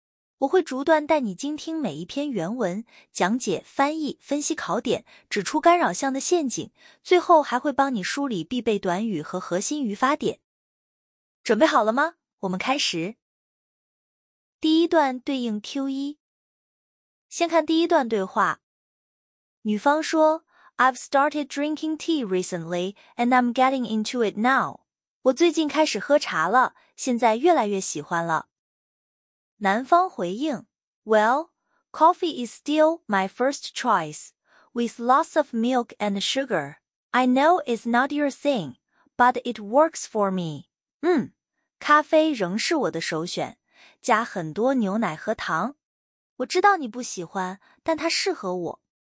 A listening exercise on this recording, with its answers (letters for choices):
第一节 听 5 段短对话,每段读两遍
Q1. What does the man usually drink?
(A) Tea.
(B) Coffee.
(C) Juice.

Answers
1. B

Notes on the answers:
问 the man。女方喝 tea 是干扰,男方用转折 "Well" 亮出 coffee。

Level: 高中